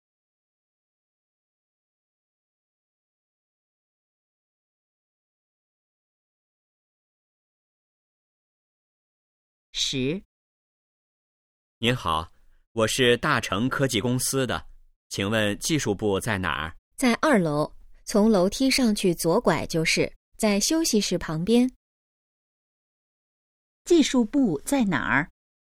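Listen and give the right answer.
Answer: 二楼,休息室旁边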